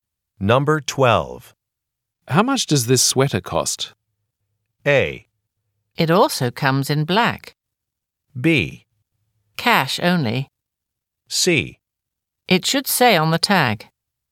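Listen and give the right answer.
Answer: C: It should say on the tag.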